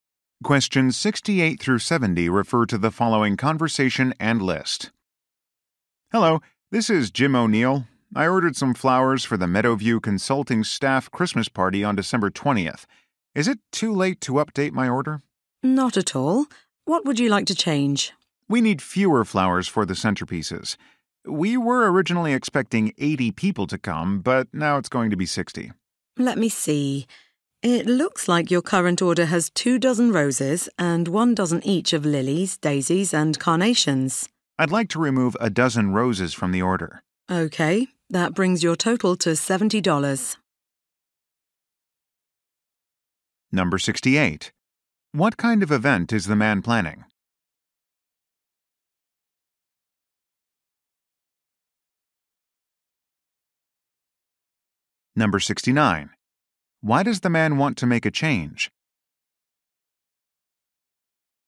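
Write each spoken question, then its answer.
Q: What kind of event is the man planning?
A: A staff Christmas party.

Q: Why does the man want to make a change?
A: Fewer people will attend than expected.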